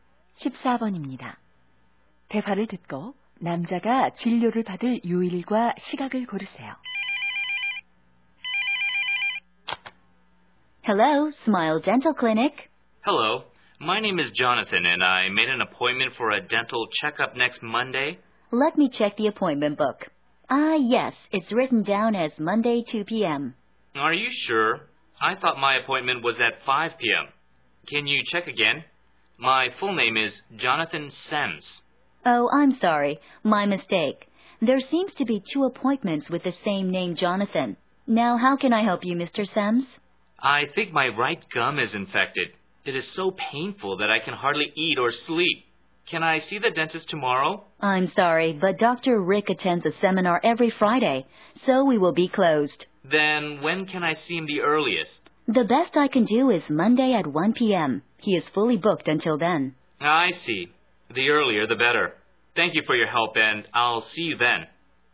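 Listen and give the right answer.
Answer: 월요일 오후 1시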